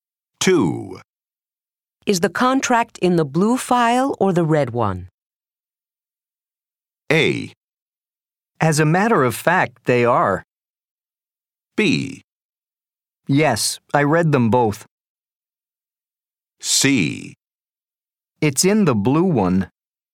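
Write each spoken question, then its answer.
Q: Is the contract in the blue file or the red one?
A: C: It's in the blue one.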